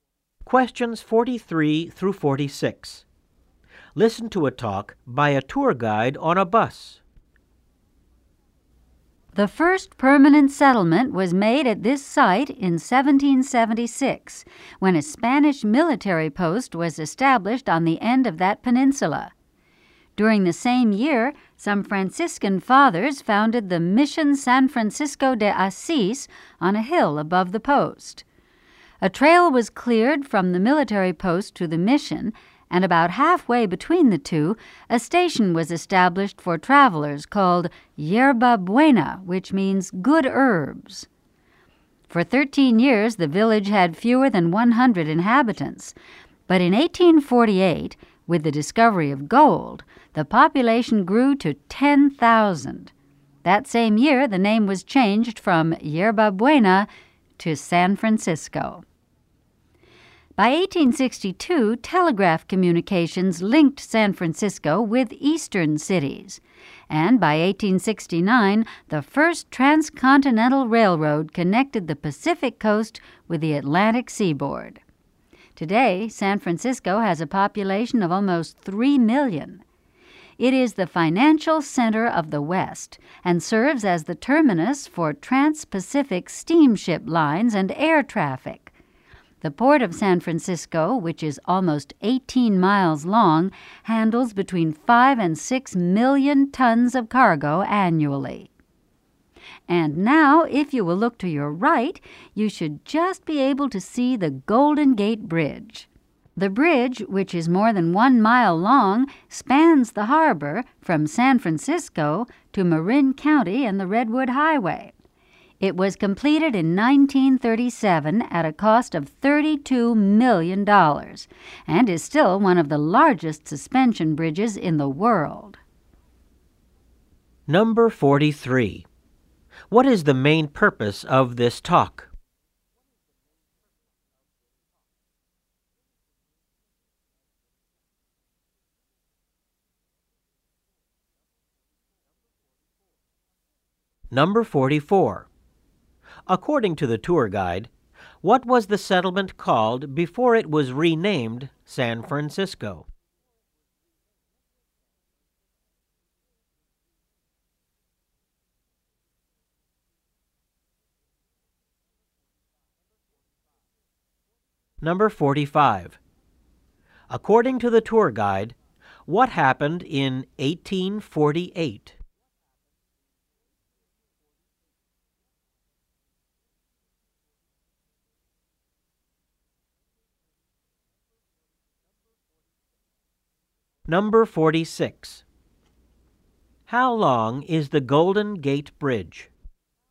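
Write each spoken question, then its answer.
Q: What is the main purpose of this talk?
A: To give the history of San Francisco to tourists

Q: According to the tour guide, what was the settlement called before it was renamed San Francisco?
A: Yerba Buena

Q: According to the tour guide, what happened in 1848?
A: Gold was discovered and the population grew to 10,000

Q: How long is the Golden Gate Bridge?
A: More than 1 mile long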